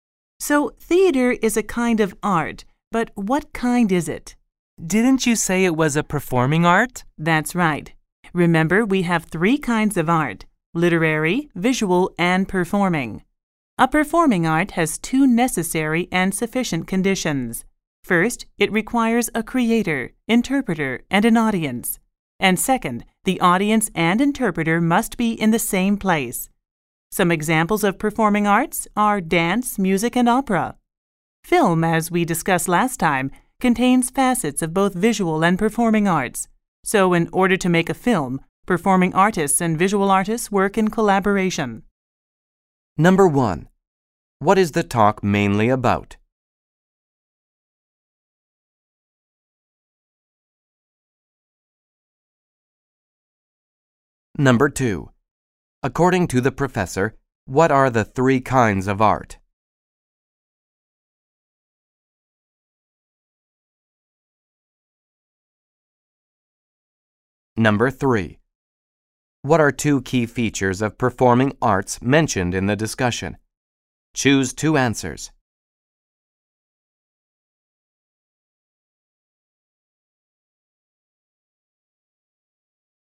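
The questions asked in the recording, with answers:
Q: According to the professor, what are the three kinds of art?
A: Literary, visual, and performing

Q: What are two key features of performing arts mentioned in the discussion? Choose two answers.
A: It requires a creator, interpreter and audience; the audience and interpreter must be in the same place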